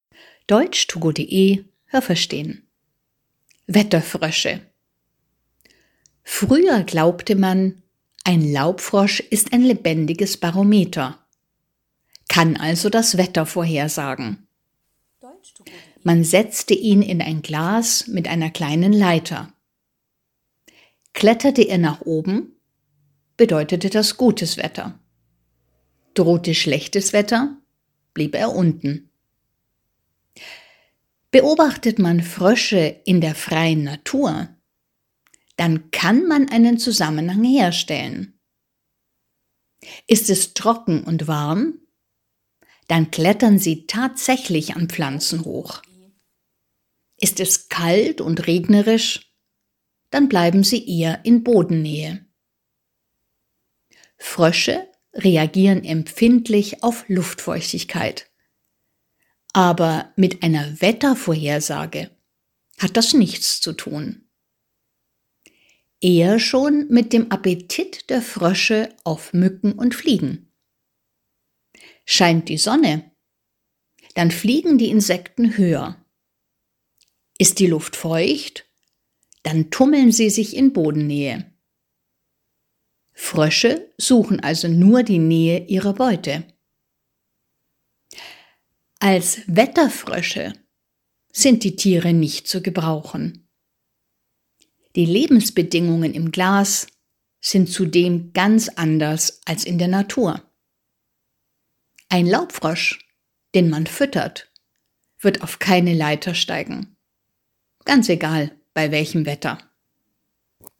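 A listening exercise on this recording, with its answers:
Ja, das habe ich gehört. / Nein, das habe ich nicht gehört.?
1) Früher war man der Meinung, dass Laubfrösche das Wetter vorhersagen können.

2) Man glaubte: Steigt der Frosch in einem Glas eine Leiter hoch, droht schlechtes Wetter.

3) In der Natur bleibt ein Frosch bei Kälte in Bodennähe und bei Wärme klettert er an Pflanzen hoch.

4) Frösche reagieren empfindlich auf die Bodenfeuchtigkeit.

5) Frösche in der Natur können das Wetter nicht vorhersagen.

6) Frösche bleiben am Boden, weil es dort bei warmem Wetter viele Insekten gibt.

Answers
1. Ja, das habe ich gehört.
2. Nein, das habe ich nicht gehört.
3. Ja, das habe ich gehört.
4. Nein, das habe ich nicht gehört.
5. Ja, das habe ich gehört.
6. Nein, das habe ich nicht gehört.

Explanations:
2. Man glaubte, wenn der Frosch nach oben klettert, wird das Wetter gut.
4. Sie reagieren empfindlich auf Luftfeuchtigkeit.
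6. Bei kaltem Wetter gibt es dort viele Insekten.

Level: B1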